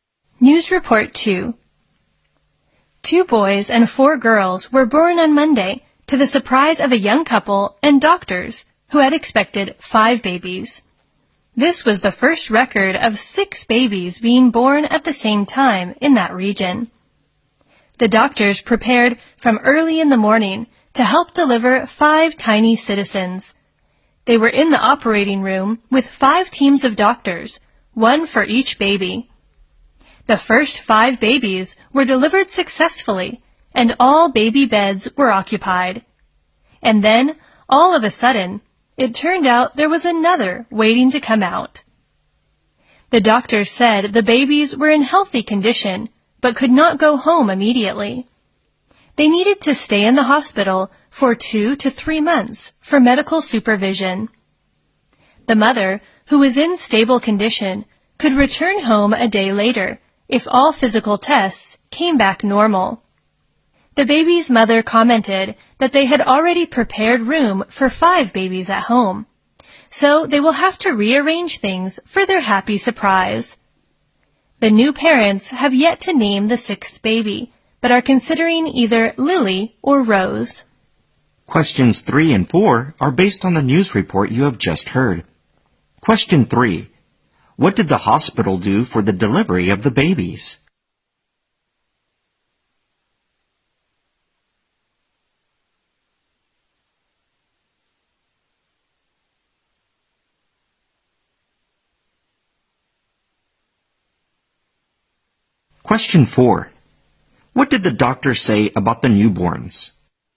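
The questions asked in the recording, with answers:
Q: What did the hospital do for the delivery of the babies?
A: It prepared five teams of doctors, one for each baby

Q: What did the doctor say about the newborns?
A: They were healthy but had to stay in hospital for 2 to 3 months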